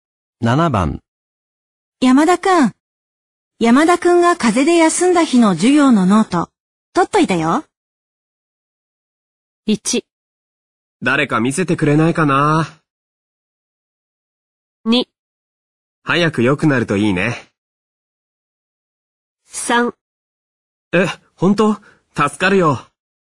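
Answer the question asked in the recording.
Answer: 3: え、本当?助かるよ。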